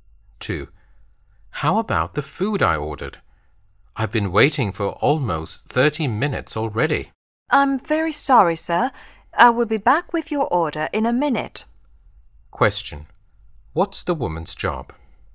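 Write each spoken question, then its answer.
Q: What's the woman's job?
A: A waitress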